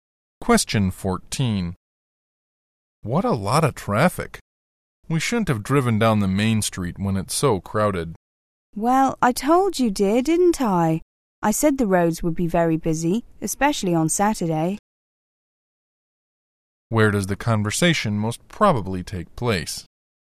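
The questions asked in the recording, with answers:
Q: Where does the conversation most probably take place?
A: In a car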